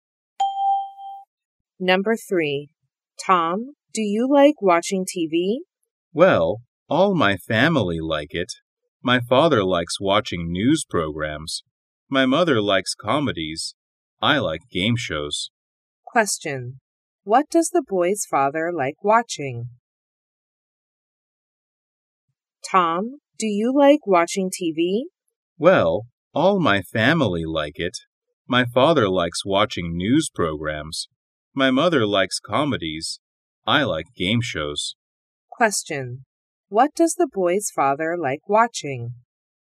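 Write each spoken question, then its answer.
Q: What does the boy's father like watching?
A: News programs.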